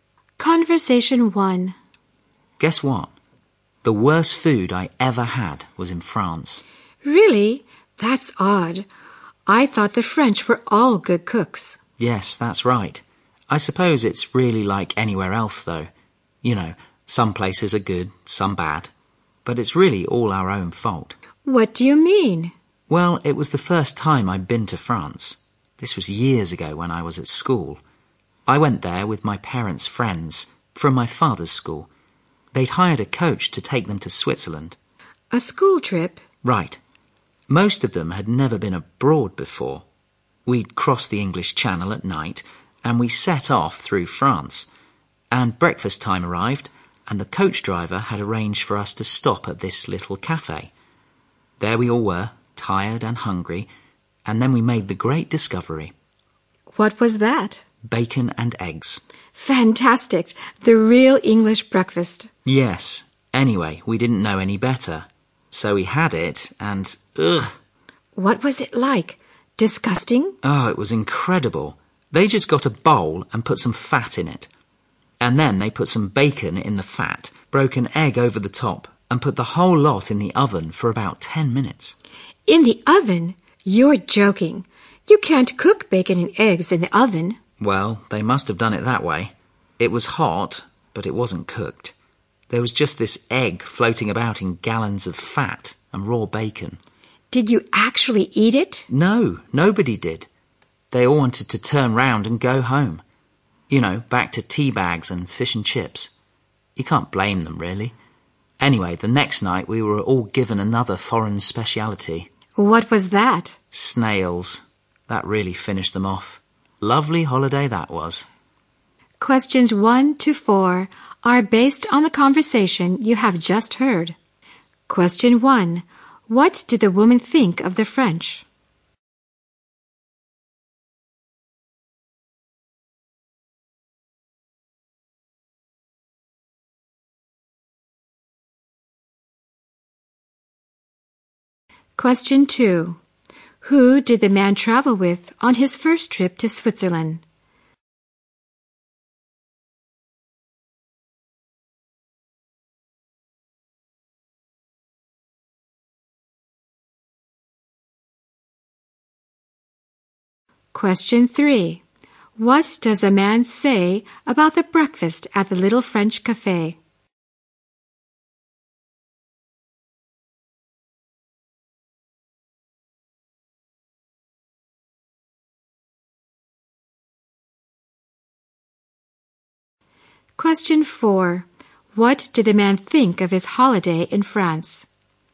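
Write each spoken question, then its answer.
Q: What did the woman think of the French?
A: They were all good cooks.

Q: Who did the man travel with on his first trip to Switzerland?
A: His parents' friends from his father's school (a school trip).

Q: What does a man say about the breakfast at the little French cafe?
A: It was disgusting: bacon and eggs in fat, hot but not cooked.

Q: What did the man think of his holiday in France?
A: It was a bad holiday (said ironically to be lovely).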